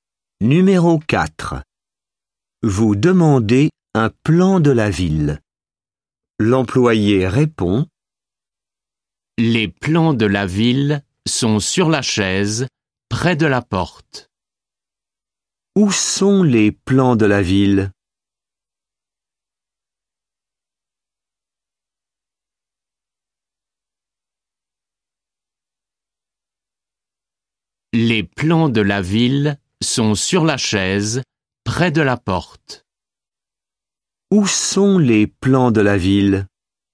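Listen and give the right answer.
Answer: Sur la chaise, près de la porte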